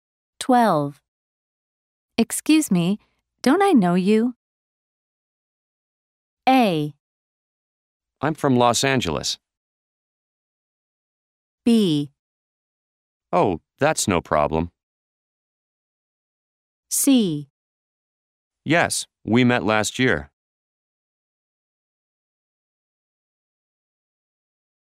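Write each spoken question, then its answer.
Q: Excuse me, don't I know you?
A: C: Yes, we met last year.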